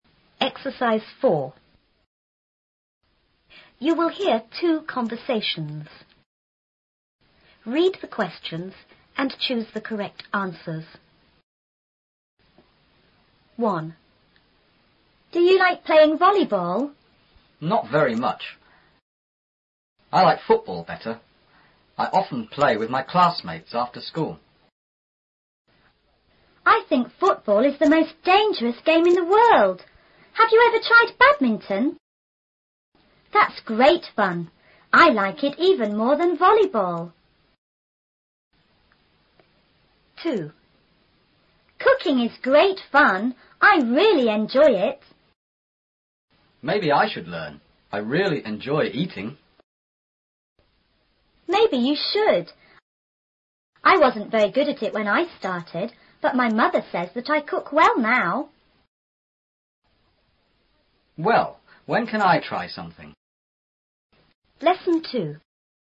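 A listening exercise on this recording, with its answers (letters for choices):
Read the questions and choose the correct answers.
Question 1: How many games did they talk about?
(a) Two.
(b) Three.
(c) Four.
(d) Five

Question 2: The girl's mother thinks the girl is___at cooking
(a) really good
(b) not good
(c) good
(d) bad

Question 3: What does the boy want to do?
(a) Learn to cook.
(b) Enjoy eating.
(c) Try some of the girl's food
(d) Try to cook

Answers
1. b
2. c
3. c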